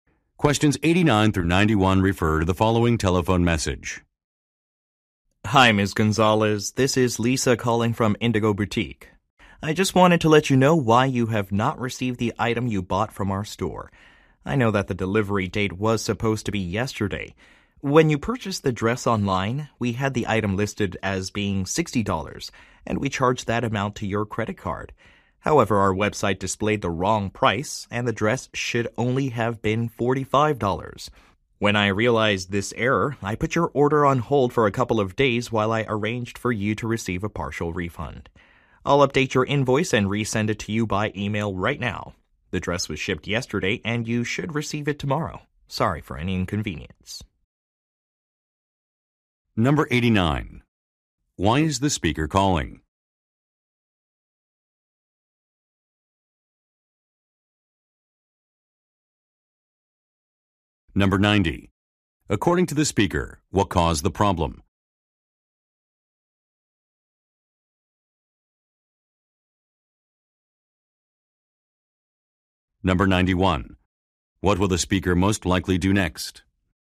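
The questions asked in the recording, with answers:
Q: Why is the speaker calling?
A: To explain why an item has not arrived

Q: According to the speaker, what caused the problem?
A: A wrong price on the website

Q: What will the speaker most likely do next?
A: Email an updated invoice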